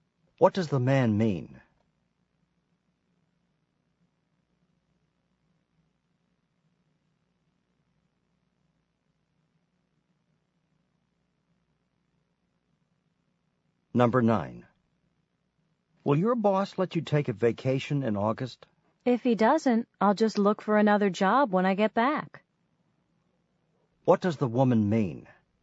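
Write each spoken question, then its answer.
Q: What does the woman mean?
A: She will take the vacation anyway and find a new job if her boss won't allow it.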